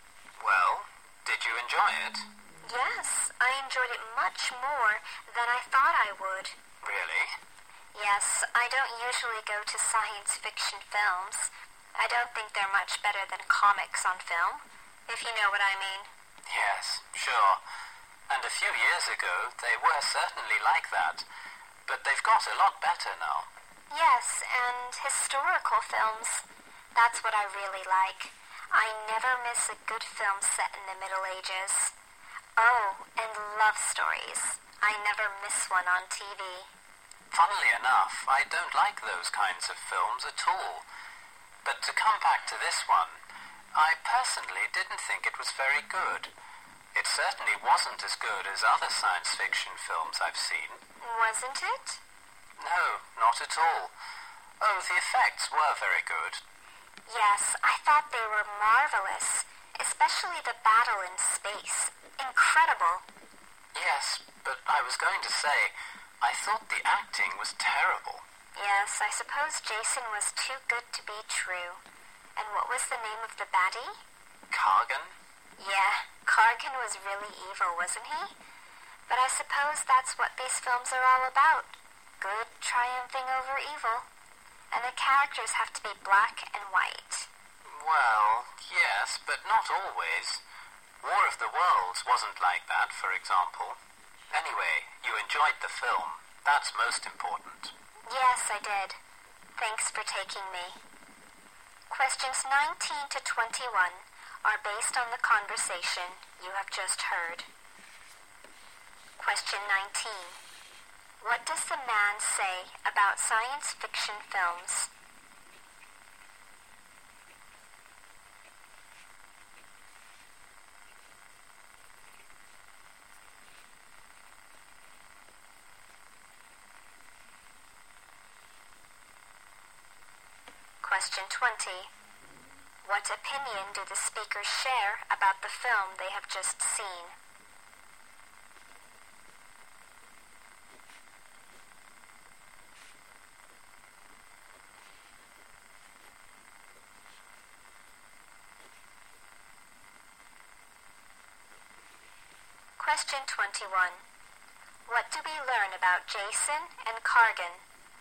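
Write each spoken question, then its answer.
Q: What does the man say about science fiction films?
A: They used to be like comics on film but have got a lot better now.

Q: What opinion do the speakers share about the film they have just seen?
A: The effects were very good.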